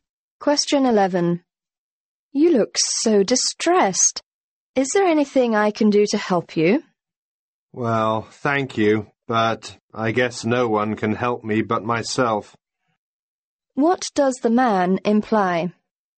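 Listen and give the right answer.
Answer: Only he himself can solve his problem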